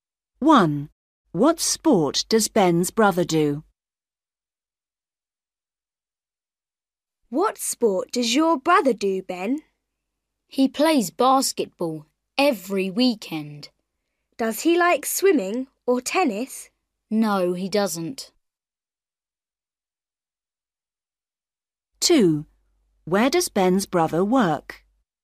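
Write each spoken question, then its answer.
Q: What sport does Ben's brother do?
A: basketball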